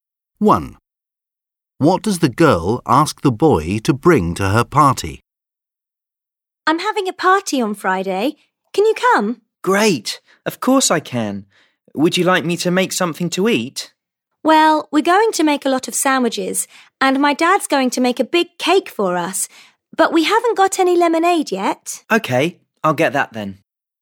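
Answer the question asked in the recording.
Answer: lemonade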